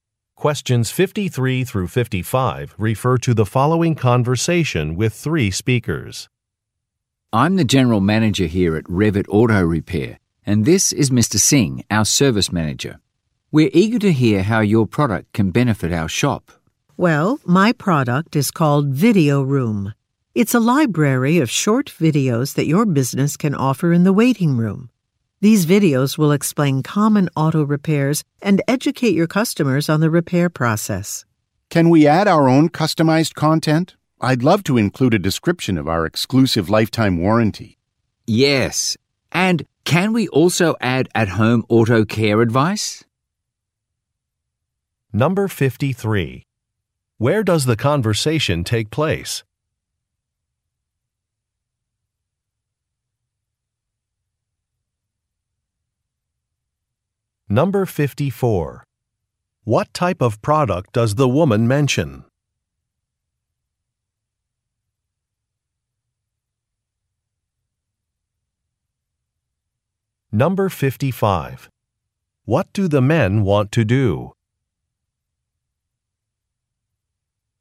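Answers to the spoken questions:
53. At an auto repair shop
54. A library of short videos
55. Add their own customized content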